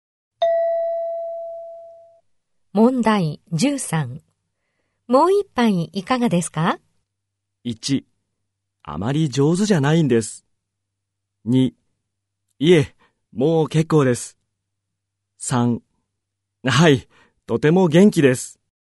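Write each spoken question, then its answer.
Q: もう一杯いかがですか?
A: 2: いえ、もう結構です。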